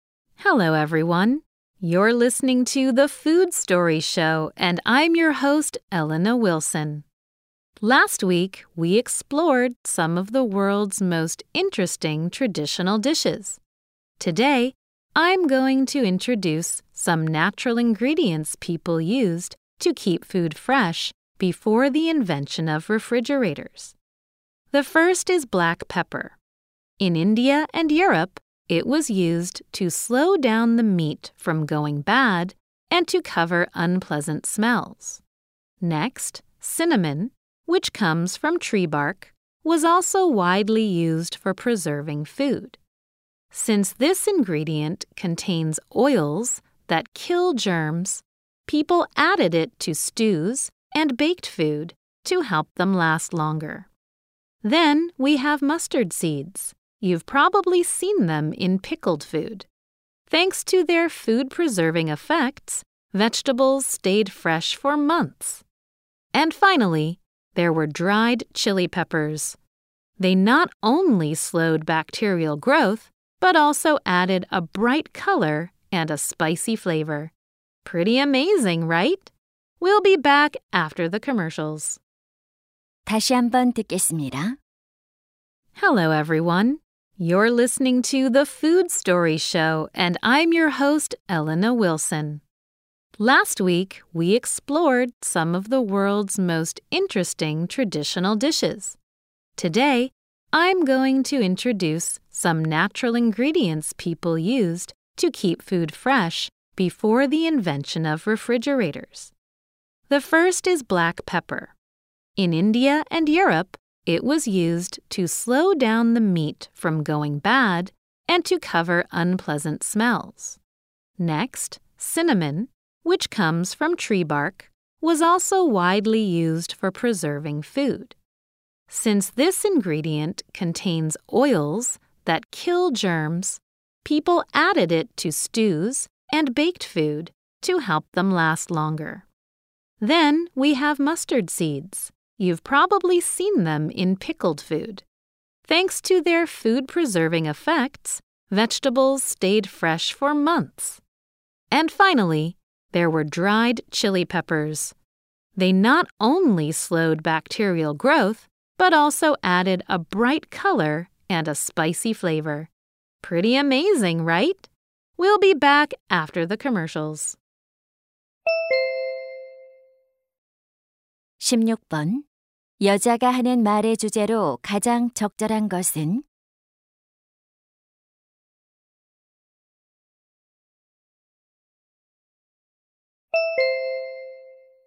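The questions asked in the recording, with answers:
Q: 여자가 하는 말의 주제로 가장 적절한 것은?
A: 냉장고 발명 이전에 음식 보존에 사용된 천연 재료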